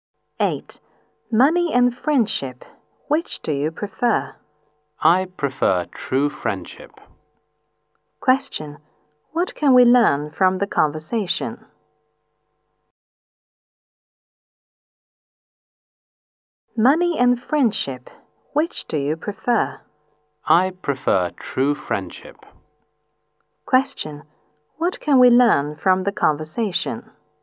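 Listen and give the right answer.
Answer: The speaker prefers true friendship to money.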